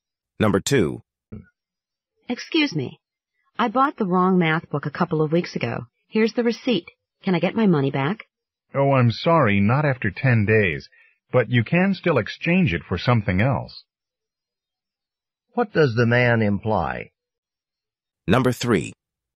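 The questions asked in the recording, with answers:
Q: What does the man imply?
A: The book can't be refunded but can be exchanged.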